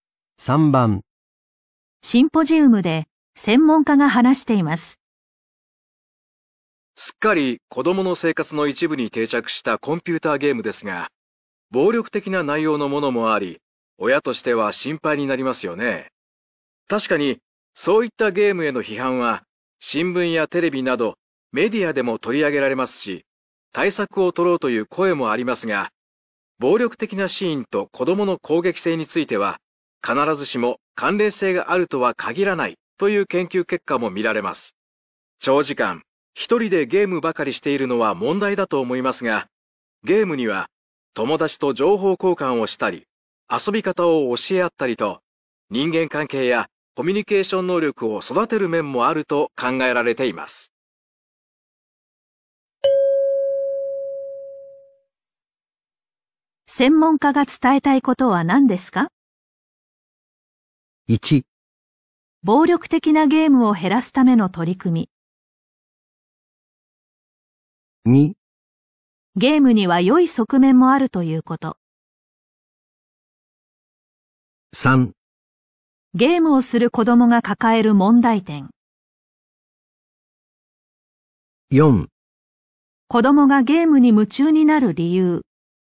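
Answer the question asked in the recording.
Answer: 2: ゲームには良い側面もあるということ。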